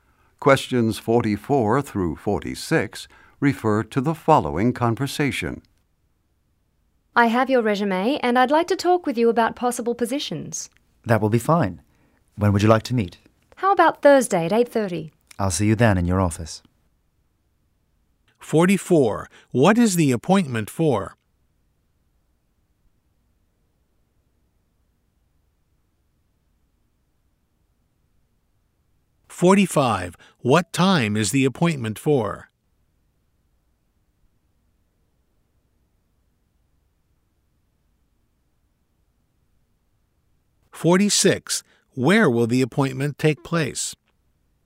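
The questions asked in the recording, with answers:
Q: What is the appointment for?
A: To talk about possible job positions

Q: What time is the appointment for?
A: 8:30 (Thursday)

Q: Where will the appointment take place?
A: In the office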